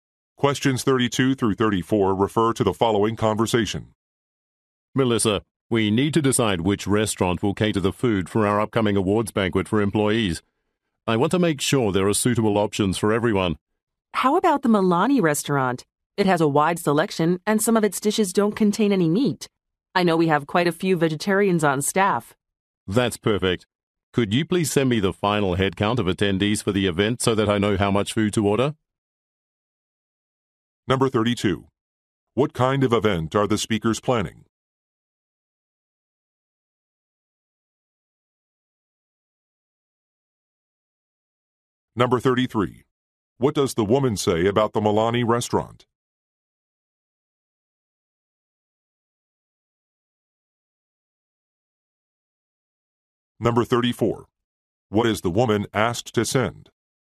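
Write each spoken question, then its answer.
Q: What kind of event are the speakers planning?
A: An awards banquet for employees

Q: What does the woman say about the Milani restaurant?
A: It has vegetarian (meat-free) dishes

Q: What is the woman asked to send?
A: The final headcount of attendees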